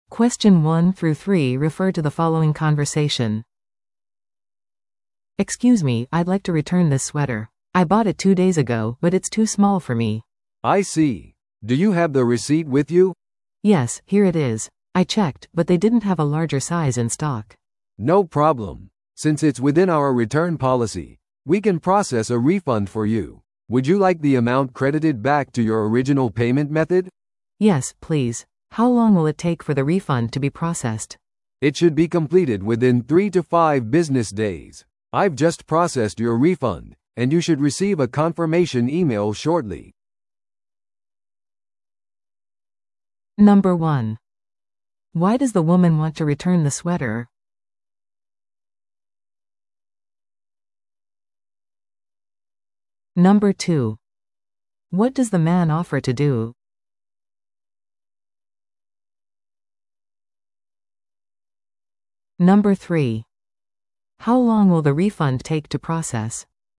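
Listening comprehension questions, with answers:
Listen to the audio below and answer the questions.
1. Why does the woman want to return the sweater?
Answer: It is too small for her.

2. What does the man offer to do?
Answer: Process a refund to her original payment method.

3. How long will the refund take to process?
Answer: Three to five business days.

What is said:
A: "Excuse me, I'd like to return this sweater. I bought it two days ago, but it's too small for me."
B: "I see. Do you have the receipt with you?"
A: "Yes, here it is. I checked, but they didn't have a larger size in stock."
B: "No problem. Since it's within our return policy, we can process a refund for you. Would you like the amount credited back to your original payment method?"
A: "Yes, please. How long will it take for the refund to be processed?"
B: "It should be completed within three to five business days. I've just processed your refund, and you should receive a confirmation email shortly."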